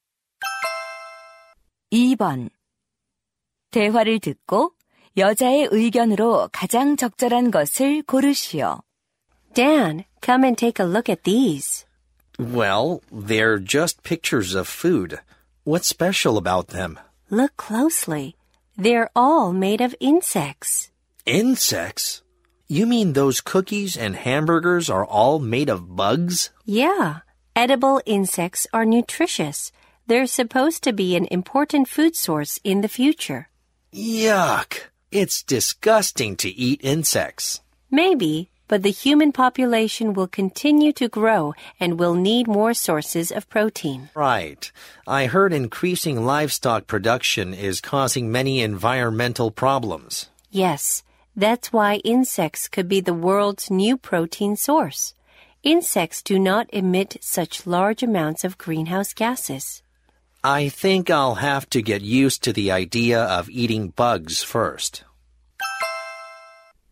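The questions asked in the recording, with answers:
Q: 대화를 듣고 여자의 의견으로 가장 적절한 것을 고르시오.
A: 식용 곤충은 미래의 중요한 단백질 공급원이 될 수 있다.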